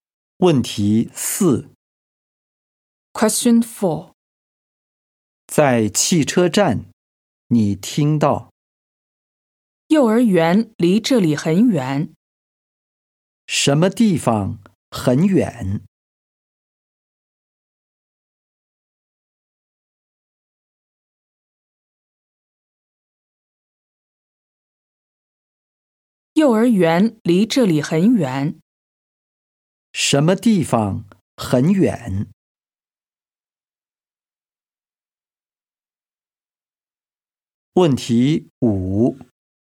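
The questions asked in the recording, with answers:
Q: 什么地方很远?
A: 幼儿园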